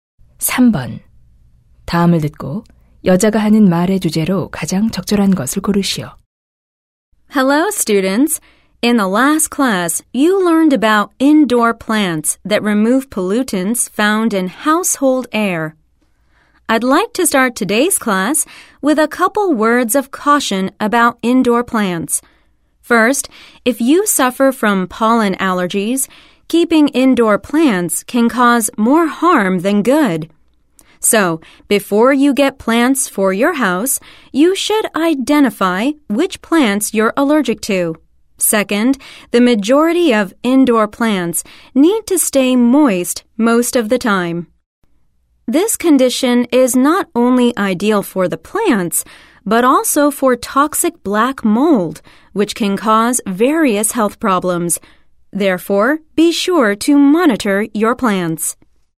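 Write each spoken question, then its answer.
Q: 다음을 듣고 여자가 하는 말의 주제로 가장 적절한 것을 고르시오.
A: 실내 식물을 기를 때의 주의사항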